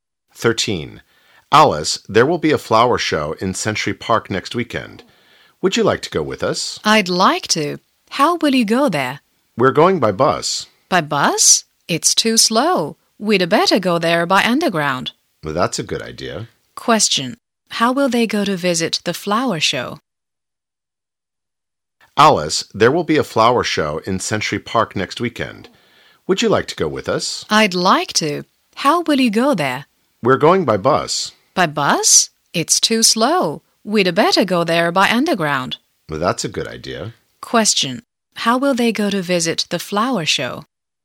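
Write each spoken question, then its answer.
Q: How will they go to visit the flower show?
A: By underground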